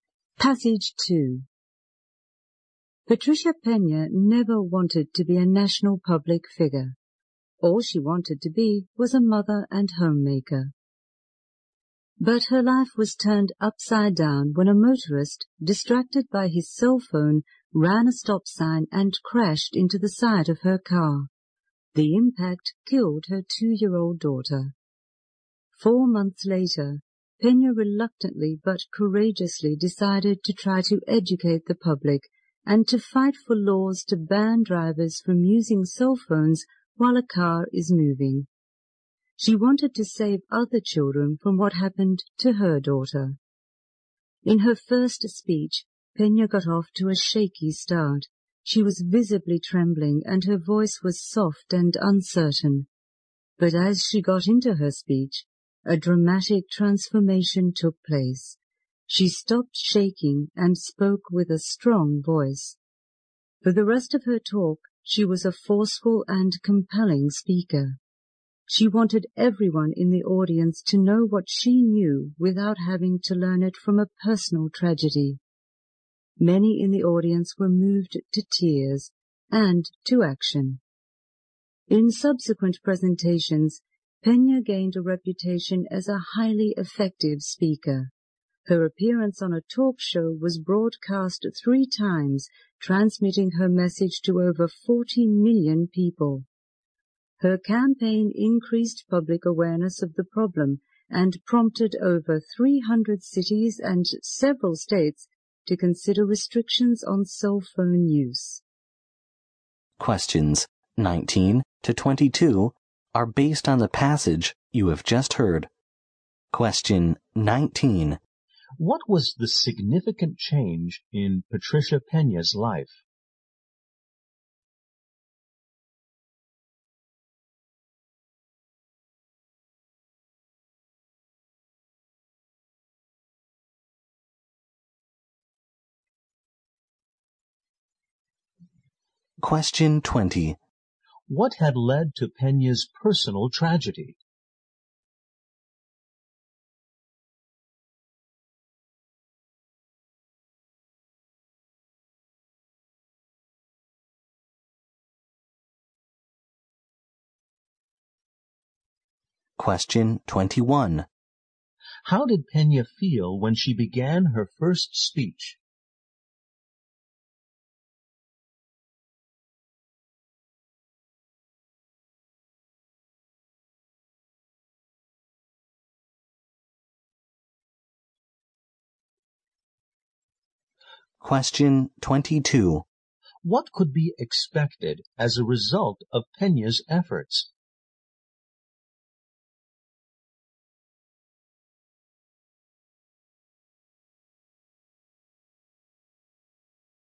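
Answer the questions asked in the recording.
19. She went from homemaker to national public figure campaigning against cell phone use while driving
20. A driver distracted by his cell phone ran a stop sign
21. Nervous
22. Restrictions on cell phone use while driving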